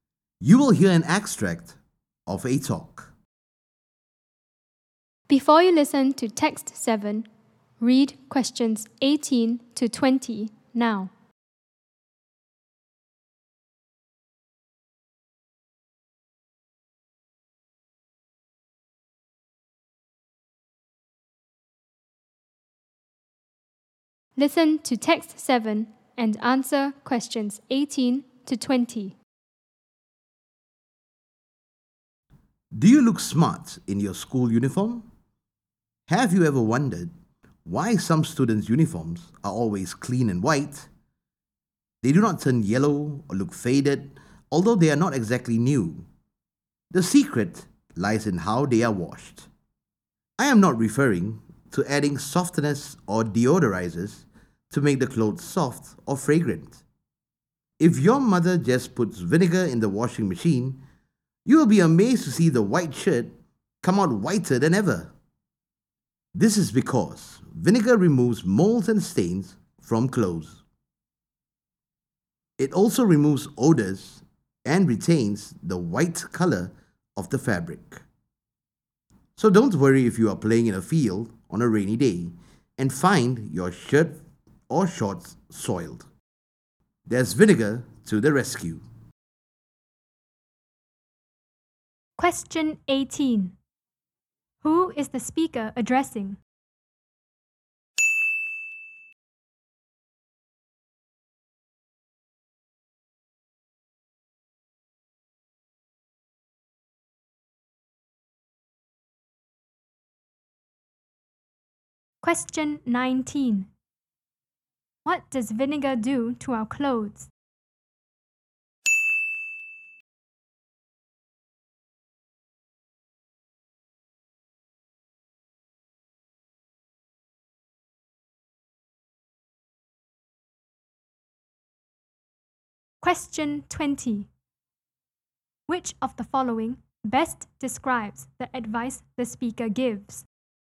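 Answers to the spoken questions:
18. Students
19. It removes molds, stains and odors and keeps white clothes white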